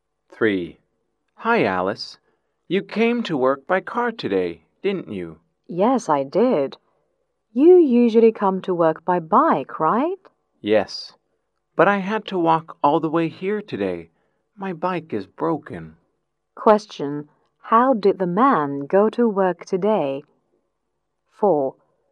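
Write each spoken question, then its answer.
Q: How did the man go to work today?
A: On foot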